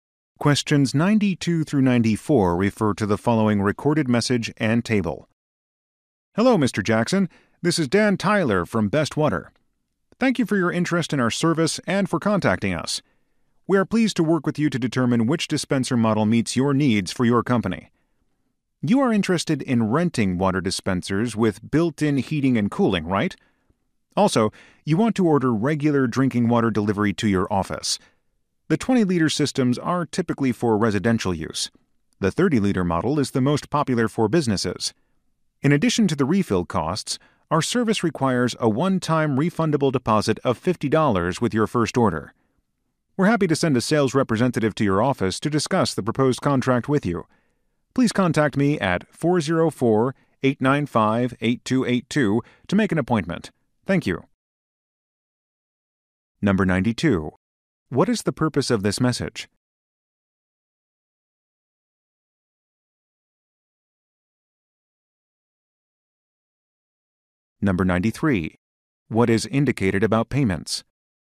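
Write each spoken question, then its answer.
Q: What is the purpose of this message?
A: To respond to an inquiry about renting water dispensers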